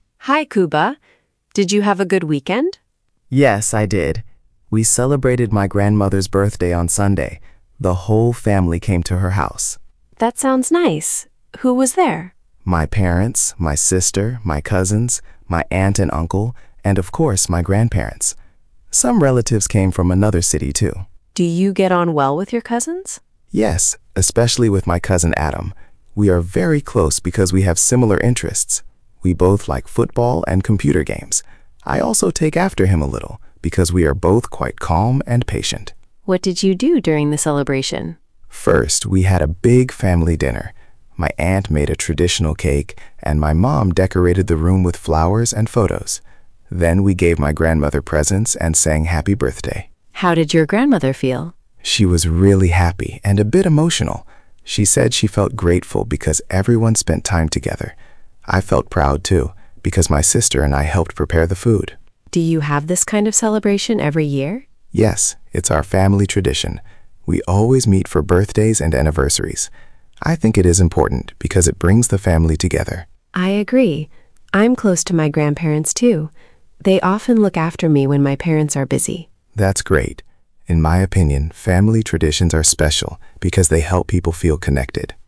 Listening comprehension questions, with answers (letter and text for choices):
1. Kuba celebrated his grandmother's birthday.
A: True

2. Only Kuba's parents came to the celebration.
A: False

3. Kuba gets on well with his cousin Adam.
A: True

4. Kuba and Adam have similar interests.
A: True

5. Kuba's family never celebrates anniversaries.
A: False

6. Mia's grandparents sometimes look after her.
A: True

Uzupełnij zdania zwrotami z nagrania:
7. I get on well ______ my cousin Adam.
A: with

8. We are very close ______ we have similar interests.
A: because

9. I'm close ______ my grandparents.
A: to

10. They often look ______ me when my parents are busy.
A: after

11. Family traditions are special ______ they help people feel connected.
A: because

Przeczytaj pytania, a potem posłuchaj i wybierz właściwą odpowiedź.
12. What are Mia and Kuba talking about?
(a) a school trip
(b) a family celebration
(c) a sports match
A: (b) a family celebration

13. Whose birthday did Kuba's family celebrate?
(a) his grandmother's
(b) his cousin's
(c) his sister's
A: (a) his grandmother's

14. What is Kuba's opinion about family traditions?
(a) They are boring.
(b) They are important because they bring the family together.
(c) They are only for children.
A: (b) They are important because they bring the family together.

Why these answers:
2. the whole family came, including cousins, aunt, uncle and relatives.
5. they always meet for birthdays and anniversaries.

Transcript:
Mia: Hi, Kuba. Did you have a good weekend?
Kuba: Yes, I did. We celebrated my grandmother's birthday on Sunday. The whole family came to her house.
Mia: That sounds nice. Who was there?
Kuba: My parents, my sister, my cousins, my aunt and uncle, and of course my grandparents. Some relatives came from another city too.
Mia: Do you get on well with your cousins?
Kuba: Yes, especially with my cousin Adam. We are very close because we have similar interests. We both like football and computer games. I also take after him a little because we are both quite calm and patient.
Mia: What did you do during the celebration?
Kuba: First, we had a big family dinner. My aunt made a traditional cake, and my mum decorated the room with flowers and photos. Then we gave my grandmother presents and sang Happy Birthday.
Mia: How did your grandmother feel?
Kuba: She was really happy and a bit emotional. She said she felt grateful because everyone spent time together. I felt proud too, because my sister and I helped prepare the food.
Mia: Do you have this kind of celebration every year?
Kuba: Yes, it's our family tradition. We always meet for birthdays and anniversary celebrations. I think it is important because it brings the family together.
Mia: I agree. I'm close to my grandparents too. They often look after me when my parents are busy.
Kuba: That's great. In my opinion, family traditions are special because they help people feel connected.

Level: A2+/B1